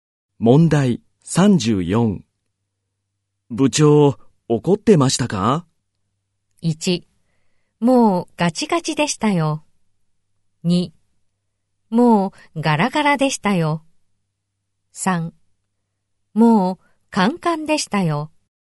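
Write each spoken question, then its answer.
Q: 部長怒ってましたか?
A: 3: もうカンカンでしたよ。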